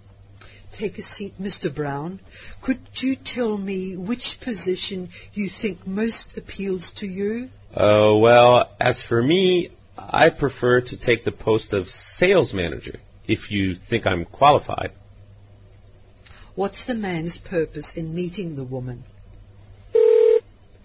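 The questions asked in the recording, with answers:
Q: What's the man's purpose in meeting the woman?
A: To apply for the post of sales manager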